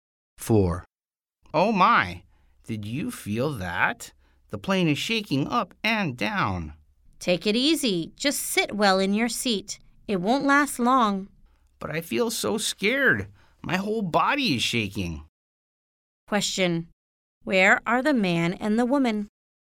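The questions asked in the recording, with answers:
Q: Where are the man and the woman?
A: On a plane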